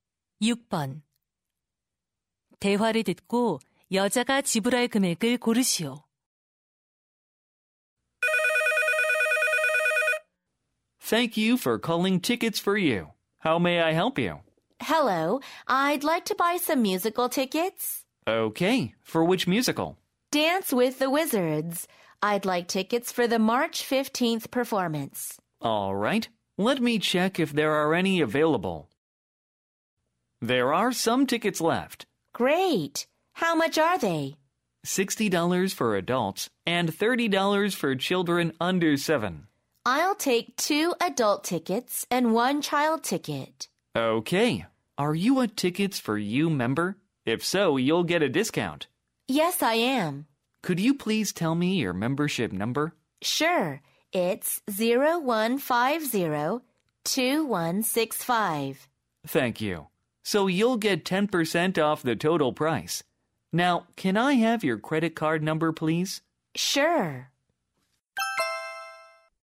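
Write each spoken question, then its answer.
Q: 대화를 듣고 여자가 지불할 금액을 고르시오.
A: $135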